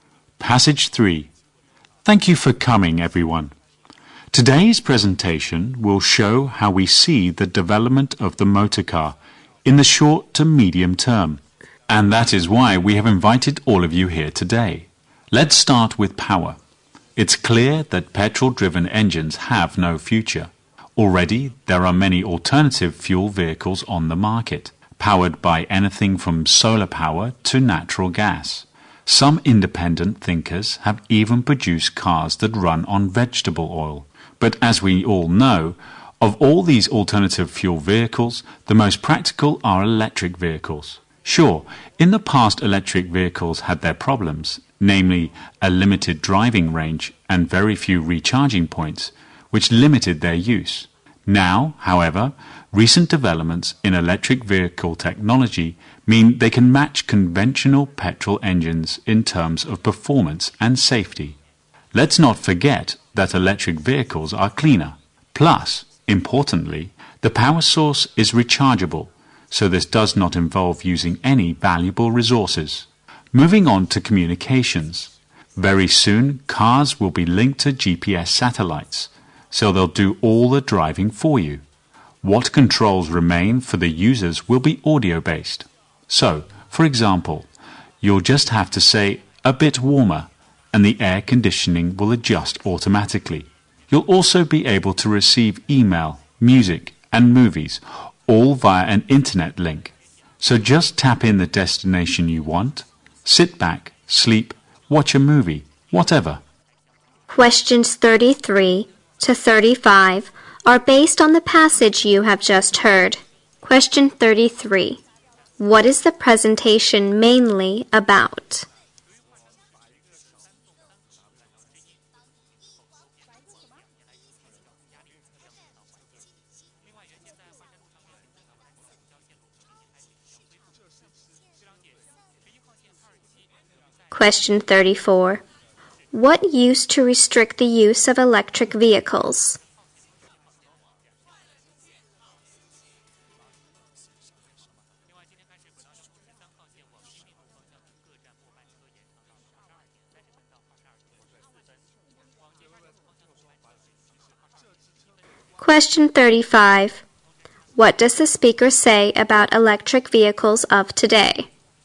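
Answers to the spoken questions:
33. How the motor car will develop in the short to medium term
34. A limited driving range and very few recharging points
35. They can match petrol cars in performance and safety, and they are cleaner.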